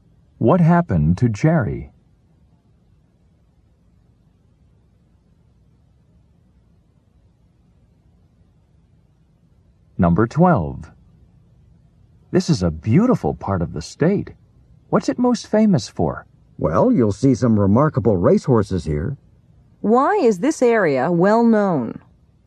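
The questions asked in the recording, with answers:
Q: Why is this area well known?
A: For its remarkable racehorses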